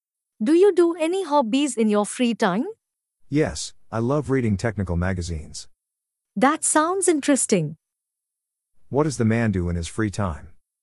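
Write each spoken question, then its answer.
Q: What does the man do in his free time?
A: He reads technical magazines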